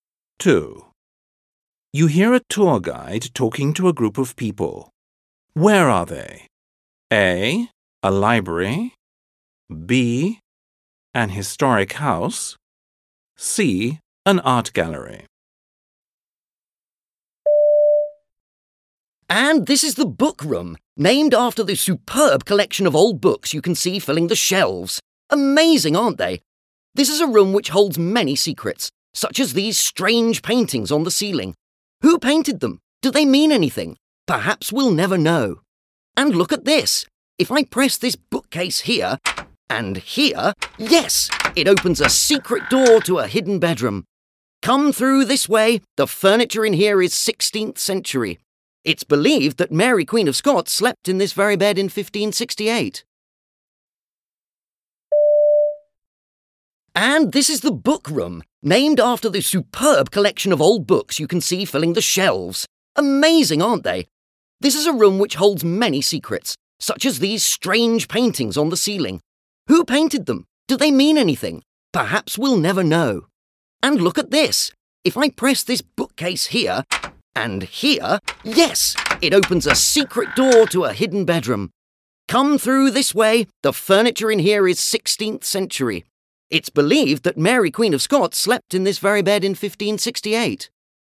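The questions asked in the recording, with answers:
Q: Where are they?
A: B: An historic house.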